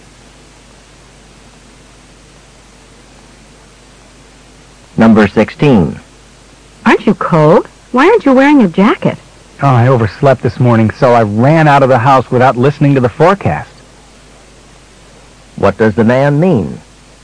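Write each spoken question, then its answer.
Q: What does the man mean?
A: He didn't know it would be cold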